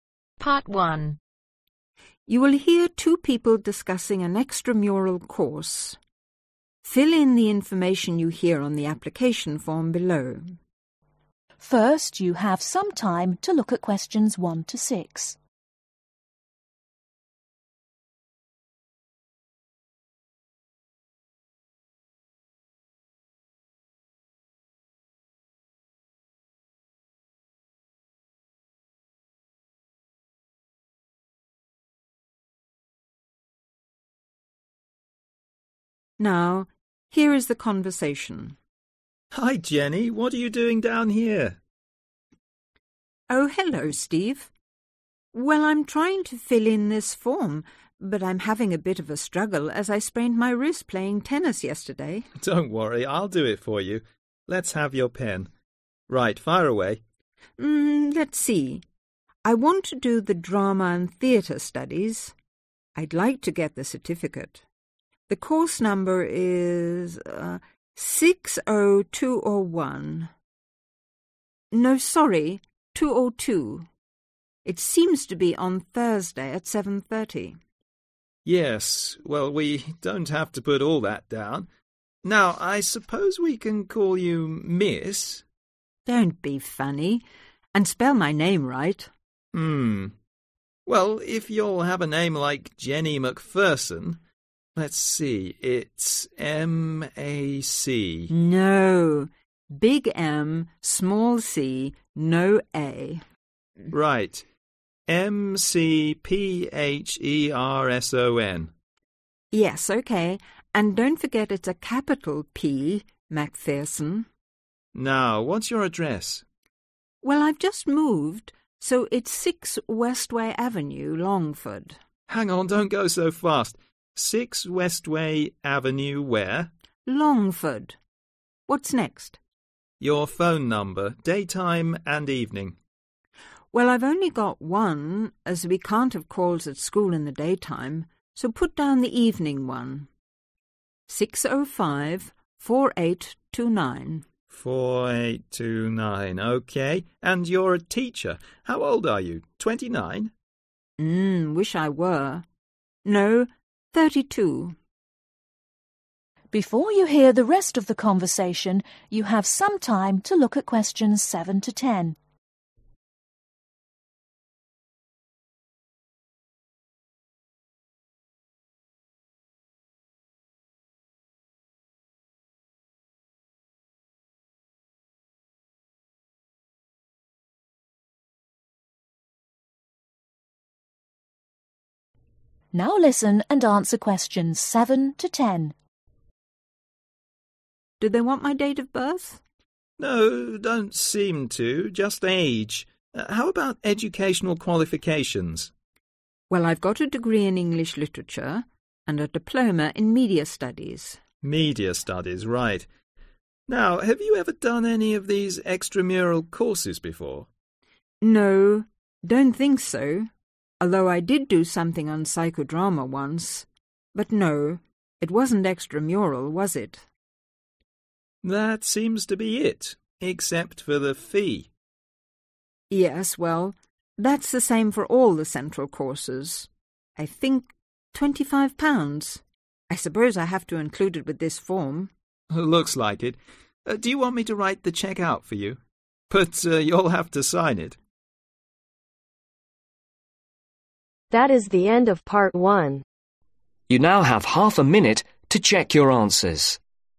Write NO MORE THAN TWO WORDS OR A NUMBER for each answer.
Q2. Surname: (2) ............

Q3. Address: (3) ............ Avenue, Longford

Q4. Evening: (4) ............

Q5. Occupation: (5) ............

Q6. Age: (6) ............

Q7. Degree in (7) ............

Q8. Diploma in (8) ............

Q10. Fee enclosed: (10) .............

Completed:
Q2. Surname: McPherson
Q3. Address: 6 West way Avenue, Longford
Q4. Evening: 6054829
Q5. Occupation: teacher
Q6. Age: 32
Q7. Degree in English Literature
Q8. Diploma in Media Studies
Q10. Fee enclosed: 25 pounds